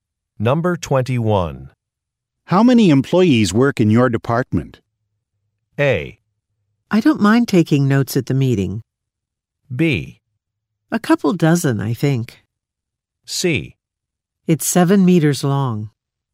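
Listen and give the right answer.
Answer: B: A couple dozen, I think.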